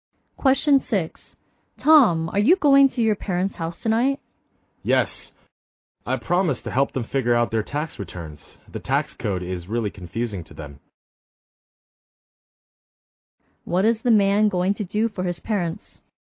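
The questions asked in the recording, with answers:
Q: What is the man going to do for his parents?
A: Help them with their tax returns.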